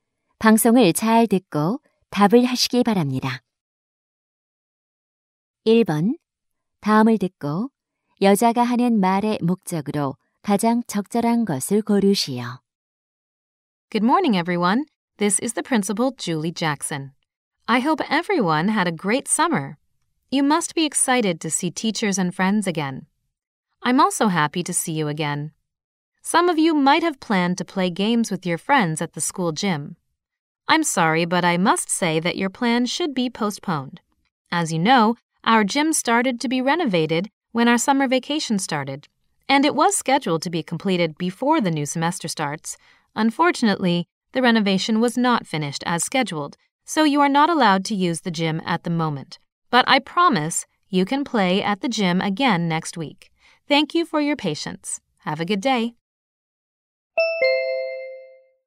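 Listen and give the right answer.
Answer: 체육관 공사가 끝나지 않아 다음 주까지 체육관을 사용할 수 없음을 알리려고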